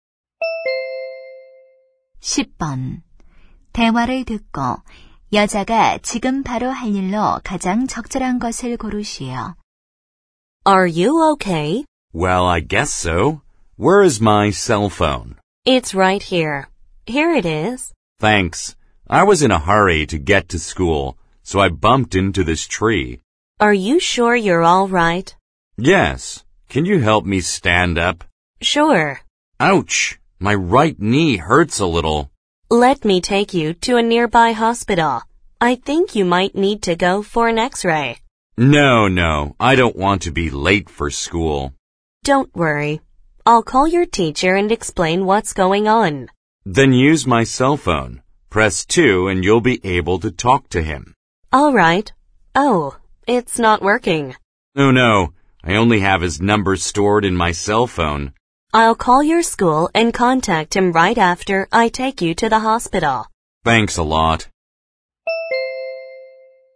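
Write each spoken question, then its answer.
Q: 대화를 듣고 여자가 지금 바로 할 일로 가장 적절한 것을 고르시오.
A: 병원에 가기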